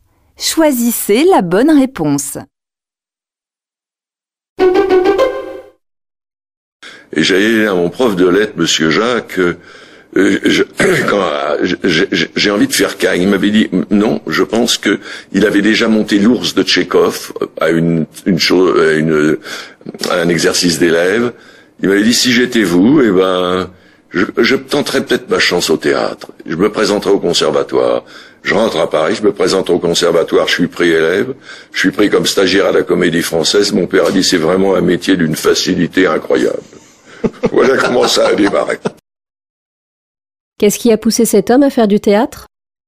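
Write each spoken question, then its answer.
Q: Qu'est-ce qui a poussé cet homme à faire du théâtre ?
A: Le conseil de son professeur de lettres, monsieur Jacques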